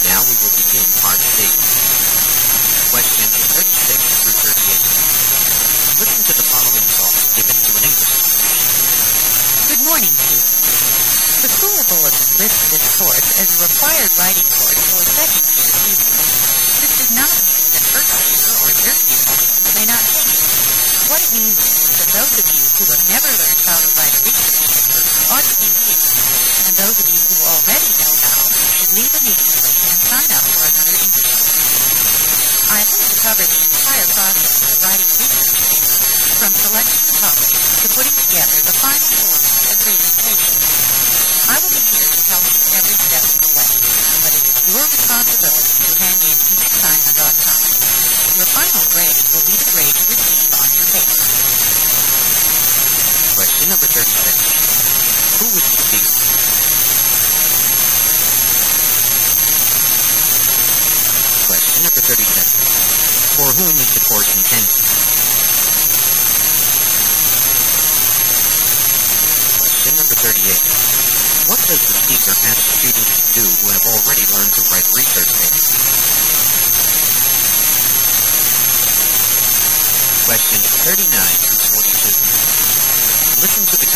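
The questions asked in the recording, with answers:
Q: For whom is the course intended?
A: Students who have never learned how to write a research paper

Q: What does the speaker ask students to do who have already learned to write research papers?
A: Leave and sign up for another English course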